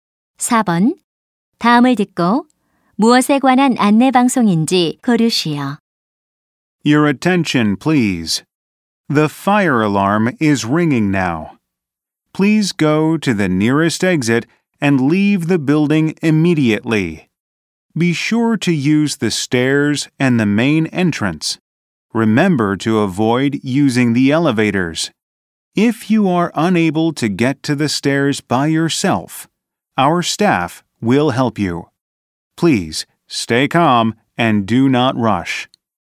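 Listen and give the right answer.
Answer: 화재 시 대피 안내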